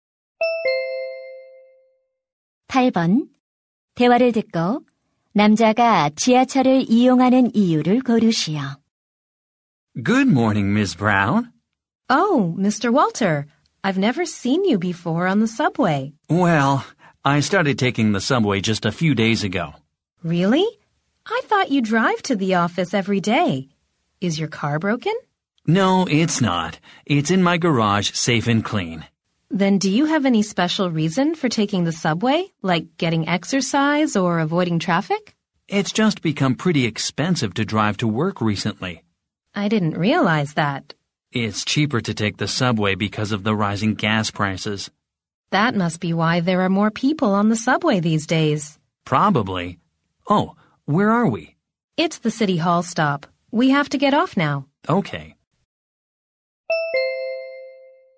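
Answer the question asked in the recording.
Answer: 기름값이 올라 운전 비용이 비싸져서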